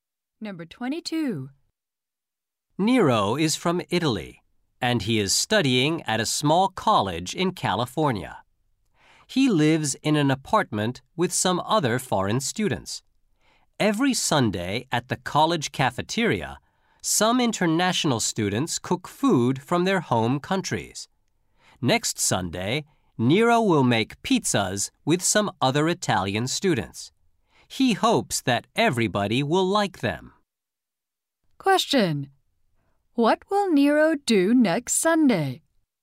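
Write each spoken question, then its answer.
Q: What will Nero do next Sunday?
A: Make pizzas with other Italian students.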